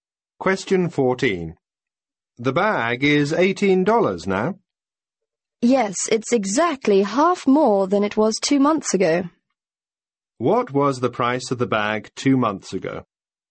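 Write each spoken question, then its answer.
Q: What was the price of the bag 2 months ago?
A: $12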